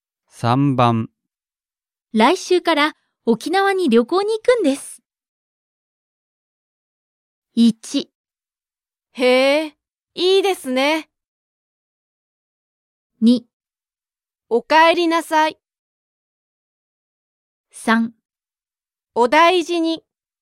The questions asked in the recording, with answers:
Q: 来週から沖縄に旅行に行くんです。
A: 1. Choice 1.